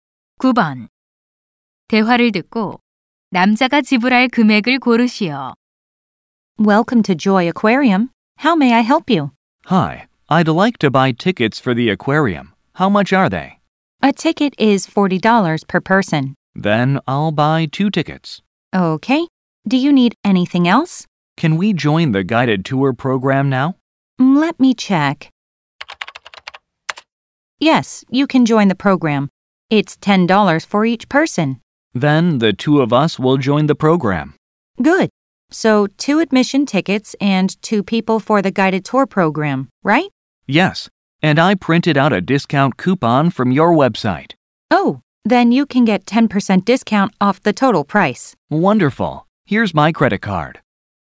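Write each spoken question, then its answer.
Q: 대화를 듣고 남자가 지불할 금액을 고르시오.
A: $90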